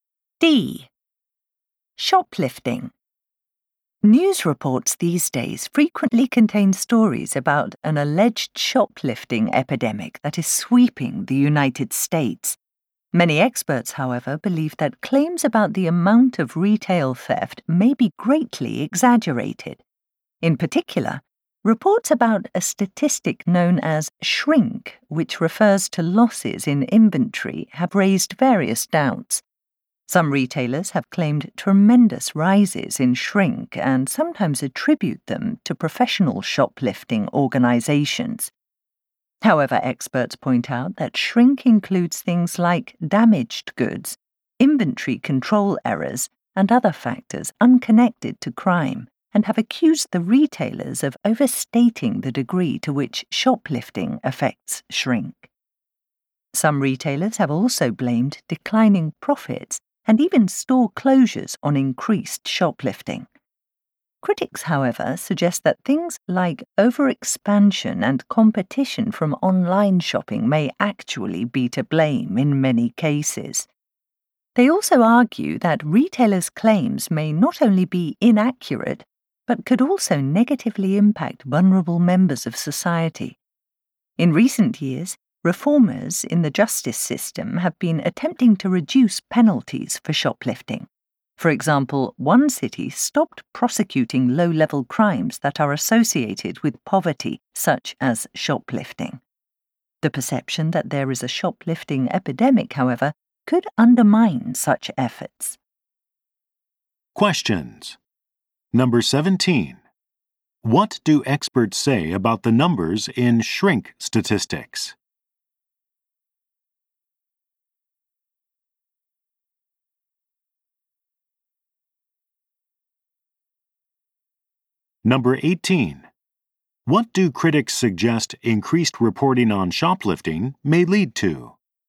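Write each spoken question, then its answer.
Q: What do experts say about the numbers in shrink statistics?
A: They include factors unrelated to crime, so retailers overstate shoplifting's role

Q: What do critics suggest increased reporting on shoplifting may lead to?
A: It could undermine efforts to reduce penalties for shoplifting, hurting vulnerable people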